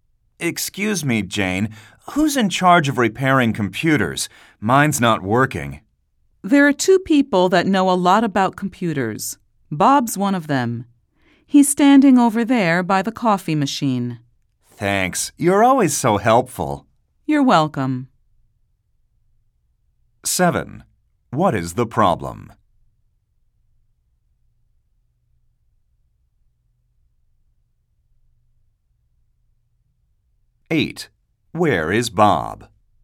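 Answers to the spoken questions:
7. Her computer is not working.
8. By the coffee machine.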